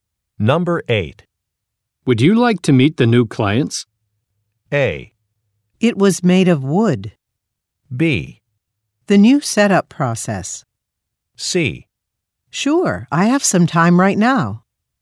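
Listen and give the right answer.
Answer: C: Sure, I have some time right now.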